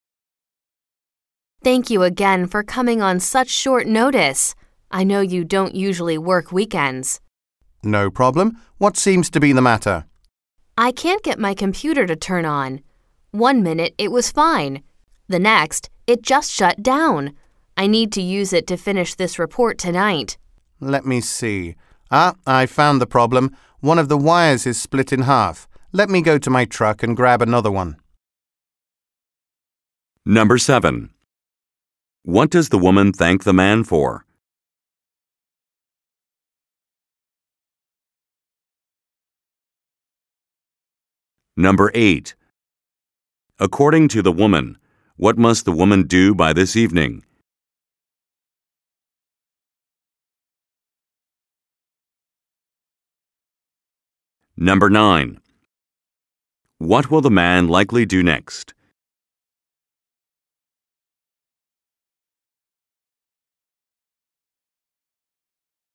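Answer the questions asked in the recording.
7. Coming on short notice (on a weekend)
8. Finish a report
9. Go to his truck to get another wire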